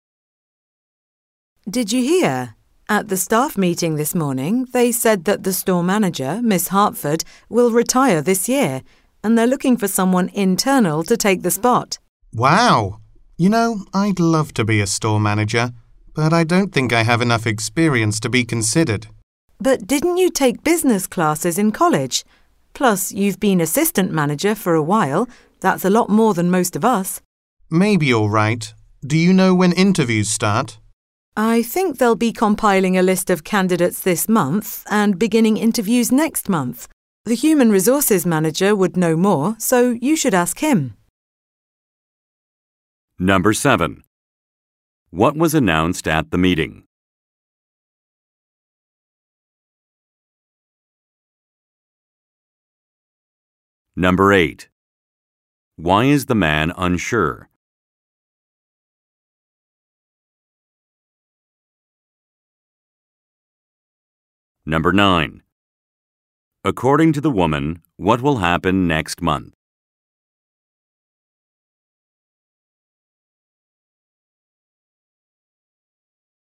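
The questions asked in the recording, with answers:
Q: What was announced at the meeting?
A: The store manager, Miss Hartford, will retire this year

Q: Why is the man unsure?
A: He thinks he lacks enough experience

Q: According to the woman, what will happen next month?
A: Interviews will begin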